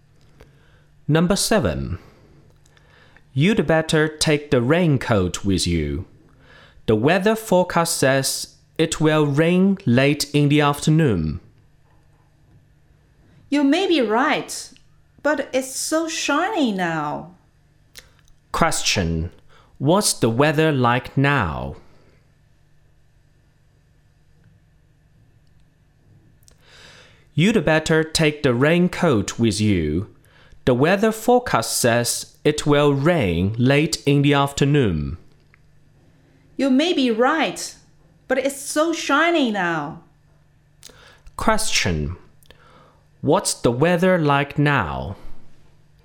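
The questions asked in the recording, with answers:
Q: What's the weather like now?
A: It's sunny.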